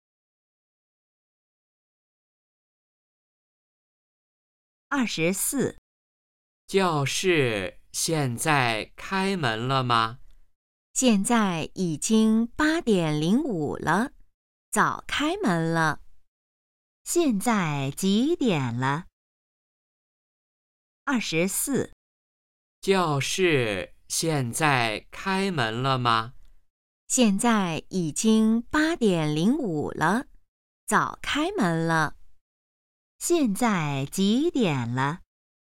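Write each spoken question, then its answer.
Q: 现在几点了?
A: 8:05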